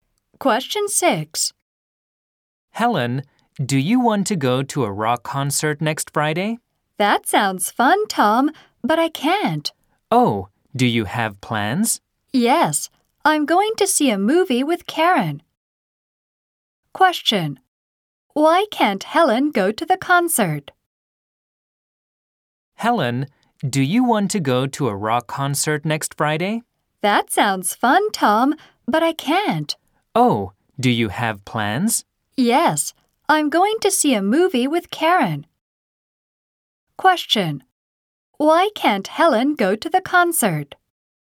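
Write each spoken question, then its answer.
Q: Why can't Helen go to the concert?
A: She is going to see a movie with Karen.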